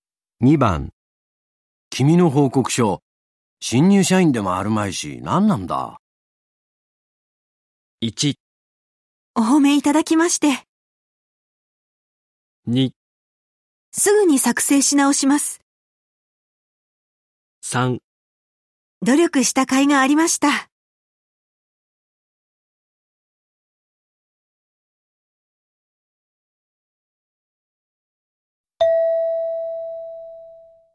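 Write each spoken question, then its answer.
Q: 君の報告書、新入社員でもあるまいし、何なんだ。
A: 2: すぐに作成し直します。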